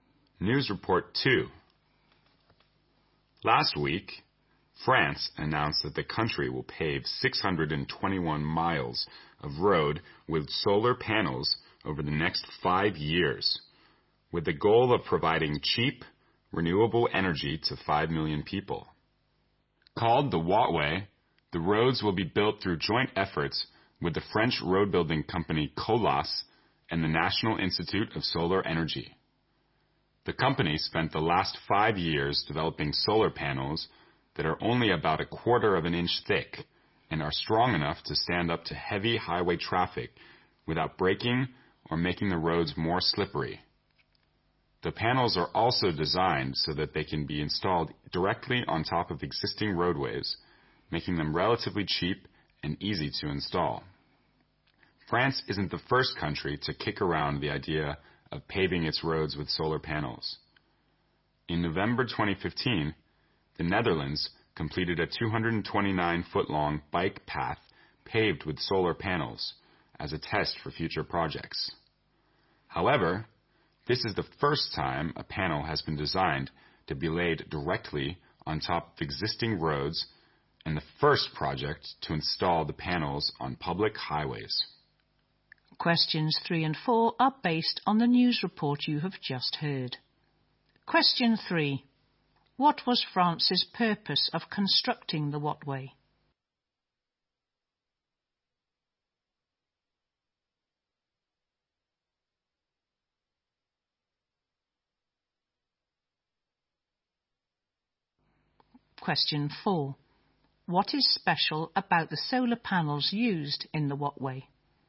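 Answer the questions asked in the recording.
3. To provide cheap, renewable energy to 5 million people
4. They are thin and strong, and can be laid directly on top of existing roads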